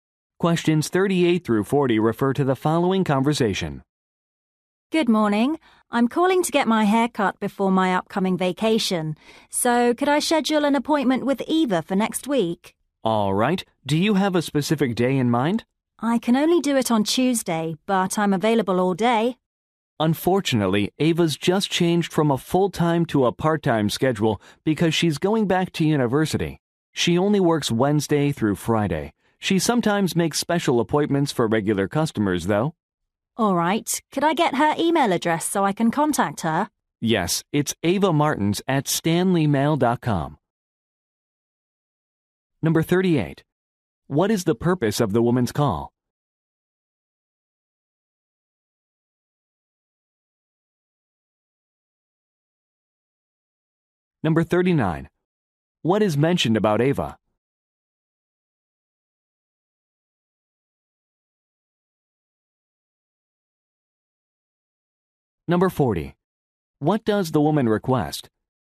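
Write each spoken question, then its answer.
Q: What is the purpose of the woman's call?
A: To book a haircut appointment

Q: What is mentioned about Ava?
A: She now works part-time

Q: What does the woman request?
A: Eva's email address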